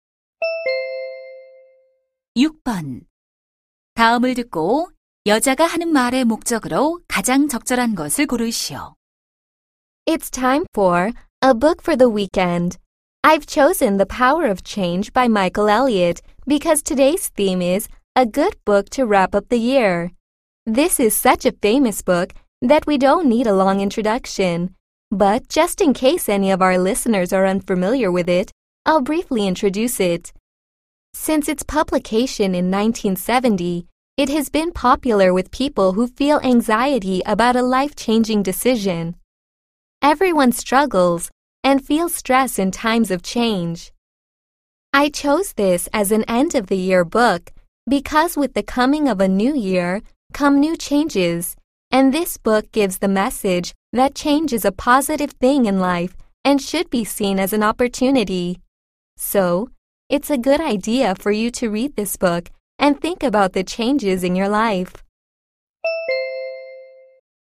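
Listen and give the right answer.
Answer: 연말에 읽을 책 소개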